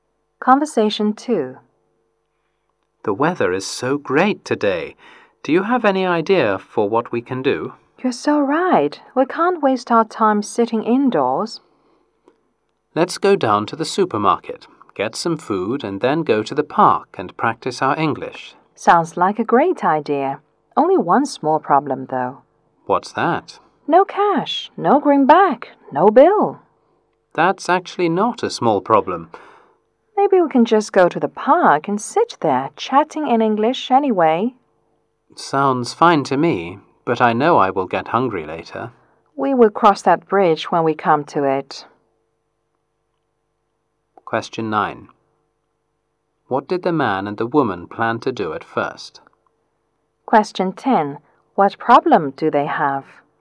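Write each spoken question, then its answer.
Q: What did the man and the woman plan to do at first?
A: Buy food at the supermarket, then go to the park and practice English

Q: What problem do they have?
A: They have no money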